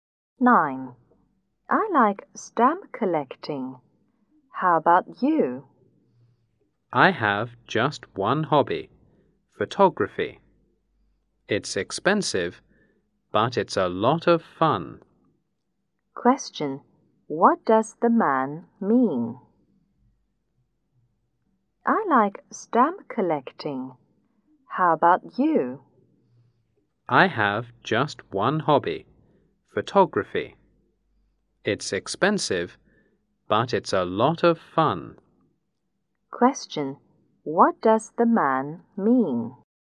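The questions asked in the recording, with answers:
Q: What does the man mean?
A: His only hobby is photography; it's expensive but a lot of fun.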